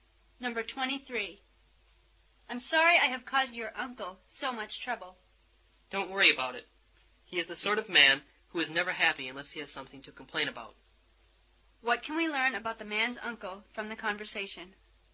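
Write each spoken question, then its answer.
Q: What can we learn about the man's uncle from the conversation?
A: He is always complaining.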